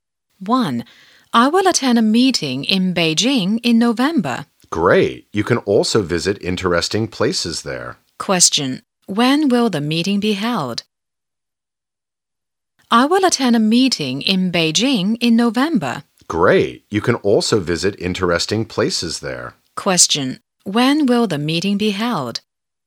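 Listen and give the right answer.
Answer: In November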